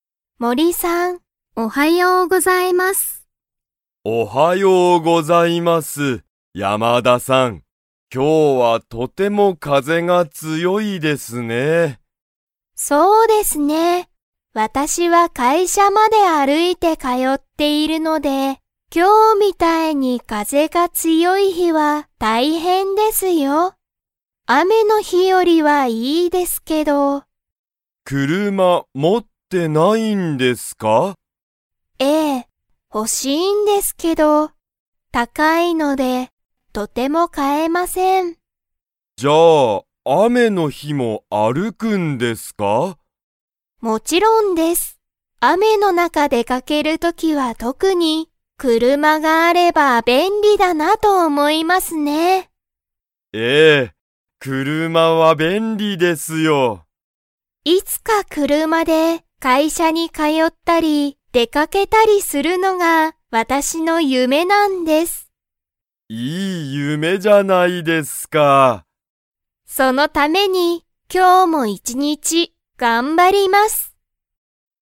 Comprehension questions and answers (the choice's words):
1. 山田やまださんは、雨あめの日ひに 会社かいしゃに通かよう。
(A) 歩あるいて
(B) 車くるまで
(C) 走はしって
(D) 自転車じてんしゃで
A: 歩あるいて

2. 山田やまださんは、車くるまを 。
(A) 持もっている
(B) 持もっていない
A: 持もっていない

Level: Level 3